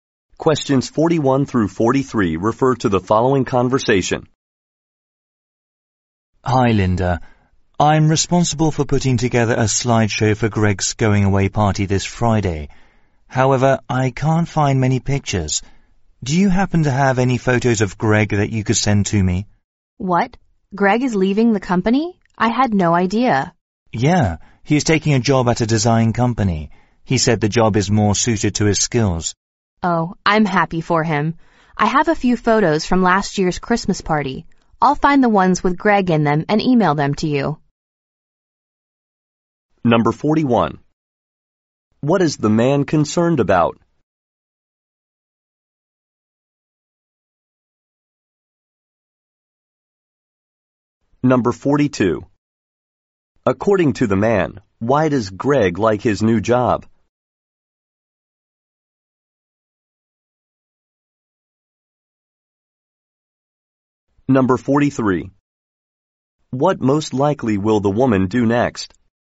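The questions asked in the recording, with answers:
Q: According to the man, why does Greg like his new job?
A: It is more suited to his skills

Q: What most likely will the woman do next?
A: Find photos of Greg and email them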